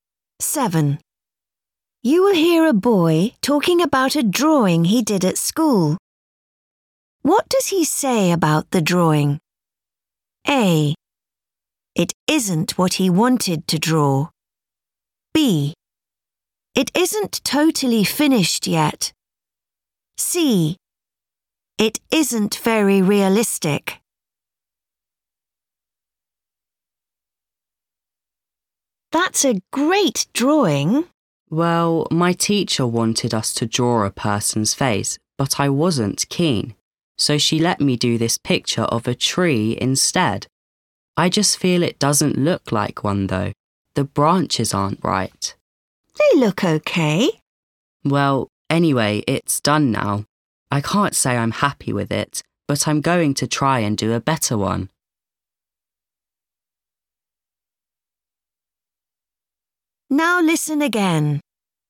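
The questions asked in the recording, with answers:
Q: What does he say about the drawing?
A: C: It isn't very realistic.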